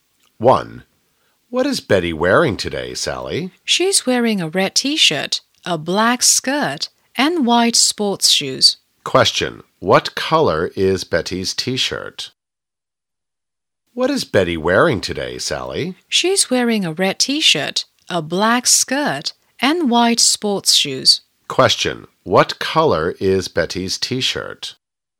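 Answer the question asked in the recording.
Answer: Red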